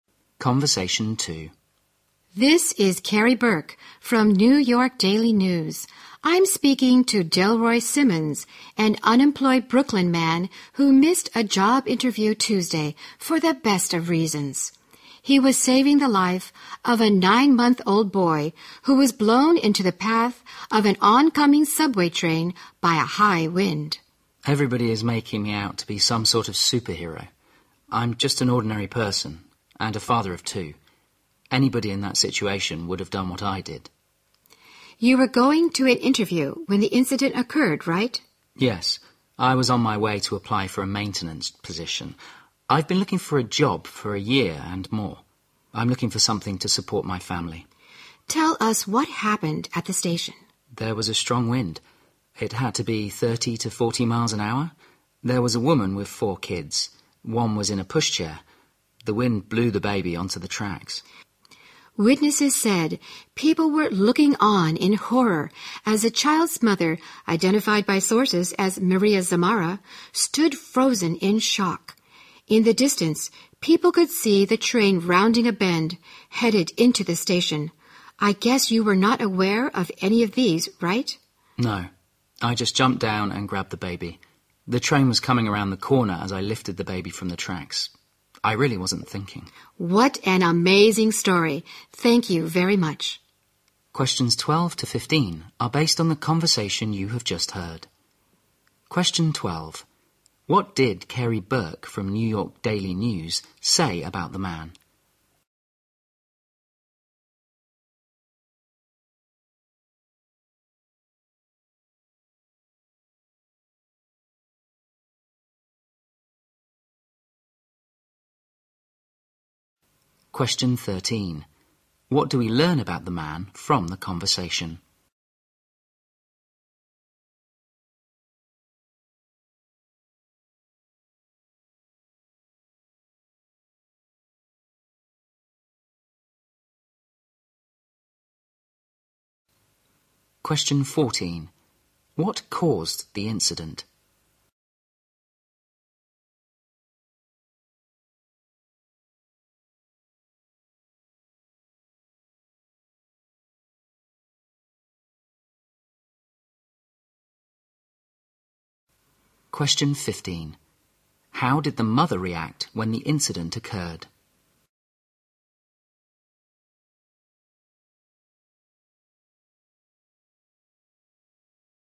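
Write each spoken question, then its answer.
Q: What did Carrie Burke from New York Daily News say about the man?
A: He missed a job interview to save a baby's life

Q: What do we learn about the man from the conversation?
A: He is unemployed and has been looking for a job for over a year

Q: What caused the incident?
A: A strong wind blew the baby onto the tracks

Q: How did the mother react when the incident occurred?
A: She stood frozen in shock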